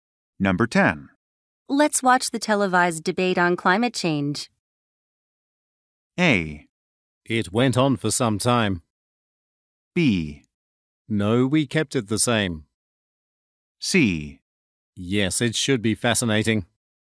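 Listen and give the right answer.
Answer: C: Yes, it should be fascinating.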